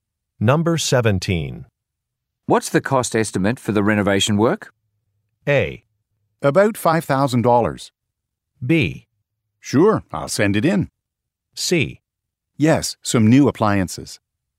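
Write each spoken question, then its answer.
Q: What's the cost estimate for the renovation work?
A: A: About $5,000.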